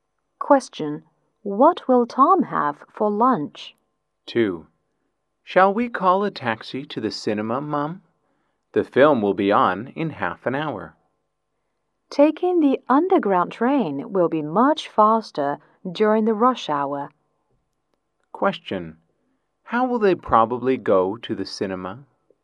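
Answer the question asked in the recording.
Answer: By underground train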